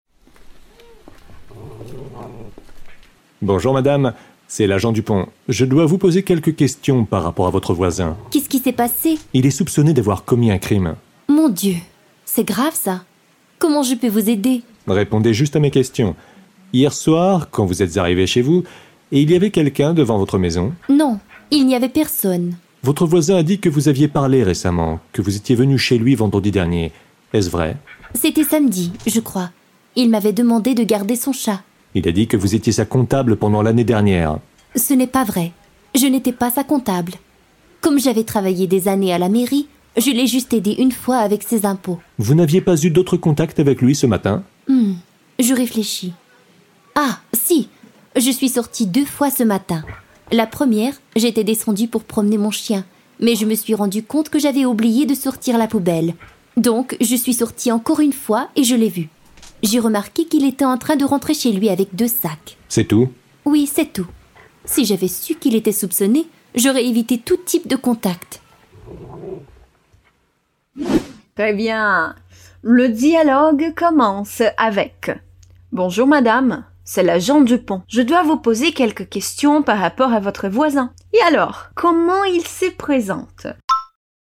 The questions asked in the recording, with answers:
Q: Et alors, comment il se présente?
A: Bonjour madame, c'est l'agent Dupont.